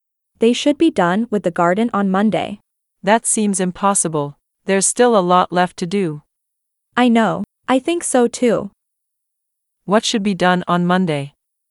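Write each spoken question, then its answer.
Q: What should be done on Monday?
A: The garden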